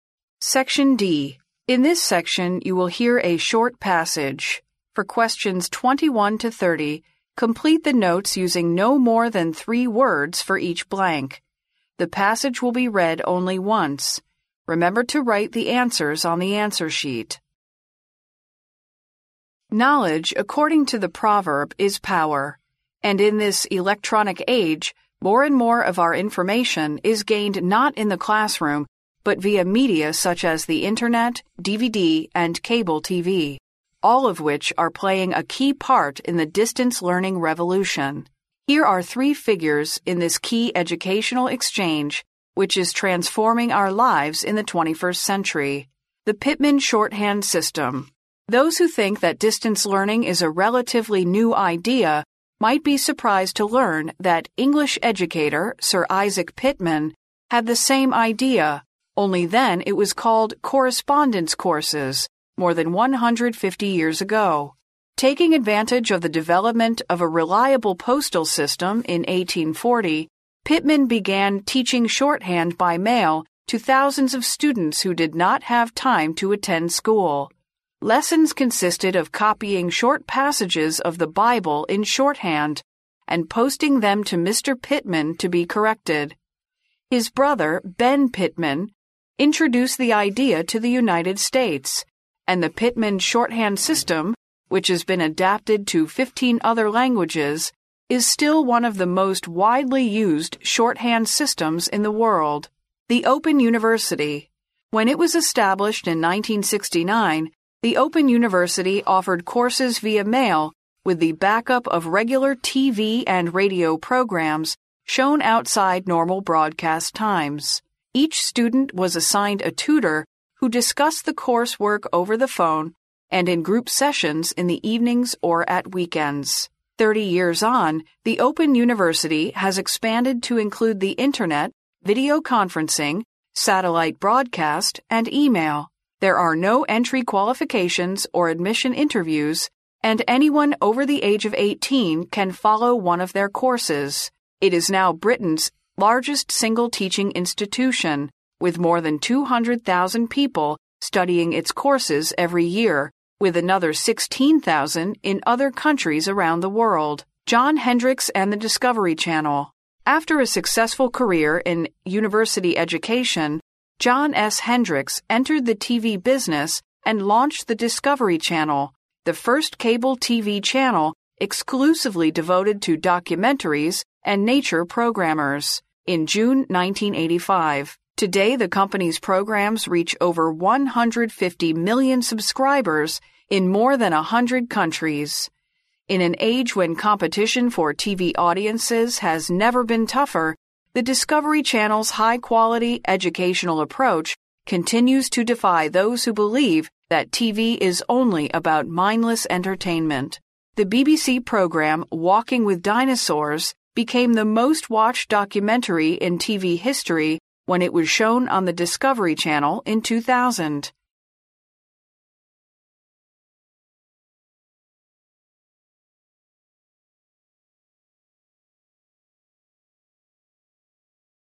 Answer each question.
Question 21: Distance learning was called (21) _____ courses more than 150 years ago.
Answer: correspondence

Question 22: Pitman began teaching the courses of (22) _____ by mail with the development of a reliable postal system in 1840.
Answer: shorthand

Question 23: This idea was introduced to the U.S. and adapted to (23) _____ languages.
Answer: fifteen other

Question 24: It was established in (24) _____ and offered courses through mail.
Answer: 1969

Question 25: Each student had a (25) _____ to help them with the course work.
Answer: tutor

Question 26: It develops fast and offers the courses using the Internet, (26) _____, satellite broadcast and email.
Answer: video-conferencing

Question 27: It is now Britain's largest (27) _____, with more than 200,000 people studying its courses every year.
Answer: single teaching institution

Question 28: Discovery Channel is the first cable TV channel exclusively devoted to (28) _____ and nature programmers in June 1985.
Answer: documentaries

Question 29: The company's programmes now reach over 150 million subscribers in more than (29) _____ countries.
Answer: a hundred

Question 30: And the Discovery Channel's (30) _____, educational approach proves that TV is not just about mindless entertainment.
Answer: high-quality

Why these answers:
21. 录音中谈到远程学习时,说很多人认为这是个相对较新颖的概念,与一百五十多年前某英国教育家的想法一样。由"Sir Isaac Pitman, had the same idea—only then it was called correspondence course—more than 150 years ago"可知,那时候被称为函授课程。因此填correspondence,表示"函授;通信"。
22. 根据录音中的"...Pitman began teaching shorthand by mail..."可知,利用1840年当时邮政系统的发展,Pitman开始给许多学生通过邮件教授速记,因此填shorthand,表示"速记"。
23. 根据录音中的"the Pitman shorthand system...has been adapted to fifteen other languages"可知,随后该方式被引进到美国,适用于另外十五种语言,因此填fifteen other。
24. 根据录音中的"When it was established in 1969, the Open University offered courses via mail"可知,该大学成立于1969年。因此填1969。
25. 根据录音中的"Each student was assigned a tutor who discussed the course work over the phone..."可知,每个学生都会配有一位老师。因此填tutor。
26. 根据录音可知,函授大学的教授方式有四种,包括网络(Internet)、视频会议(video-conferencing)、卫星广播(satellite broadcast)和电子邮件(e-mail)。因此填video-conferencing。
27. 根据录音中的"It is now Britain's largest single teaching institution"可知,此处填single teaching institution。
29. 根据录音中的"Today, the company's programmes reach over 150 million subscribers in more than a hundred countries"可知,此处填a hundred。

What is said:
Knowledge, according to the proverb, is power. And in this electronic age, more and more of our information is gained not in the classroom, but via media such as the Internet, DVD and cable TV...all of which are playing a key part in the distance learning revolution. Here are three figures in this key educational exchange which is transforming our lives in the 21st century.
The Pitman Shorthand System
Those who think that distance learning is a relatively new idea might be surprised to learn that English educator, Sir Isaac Pitman, had the same idea—only then it was called correspondence course—more than 150 years ago. Taking advantage of the development of a reliable postal system in 1840, Pitman began teaching shorthand by mail to thousands of students who did not have time to attend school. "Lessons" consisted of copying short passages of the Bible in shorthand, and posting them to Mr. Pitman to be corrected. His brother, Benn Pitman, introduced the idea to the United States, and the Pitman shorthand system—which has been adapted to fifteen other languages—is still one of the most widely used shorthand systems in the world.
The Open University
When it was established in 1969, the Open University offered courses via mail; with the back-up of regular TV and radio programmes shown outside normal broadcast times. Each student was assigned a tutor who discussed the course work over the phone, and in group sessions in the evenings or at weekends.
Thirty years on, the Open University has expanded to include the Internet, video-conferencing, satellite broadcast and email. There are no entry qualifications or admission interviews, and anyone over the age of eighteen can follow one of their courses. It is now Britain's largest single teaching institution, with more than 200,000 people studying its courses every year, with another 16,000 in other countries around the world.
John Hendricks and the Discovery Channel
After a successful career in university education, John S. Hendricks entered the TV business and launched the Discovery Channel—the first cable TV channel exclusively devoted to documentaries and nature programmers—in June 1985. Today, the company's programmes reach over 150 million subscribers in more than a hundred countries. In an age when competition for TV audiences has never been tougher, the Discovery Channel's high-quality, educational approach continues to defy those who believe that TV is only about mindless entertainment. The BBC programme Walking with Dinosaurs became the most-watched documentary in TV history when it was shown on the Discovery Channel in 2000.